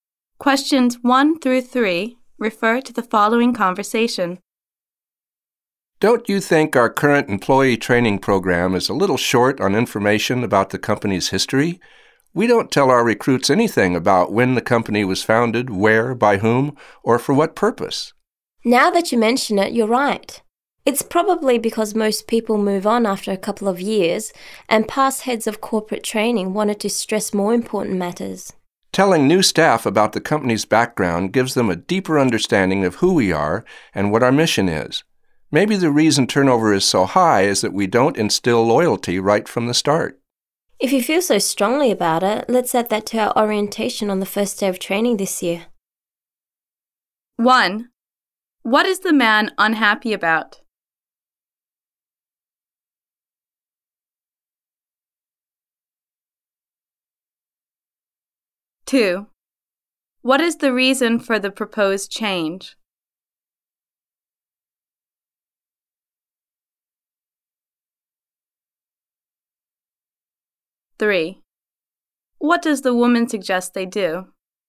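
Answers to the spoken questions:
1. The training program lacks information about the company's history
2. To build employee loyalty and reduce high turnover
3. Add company history to the first-day orientation this year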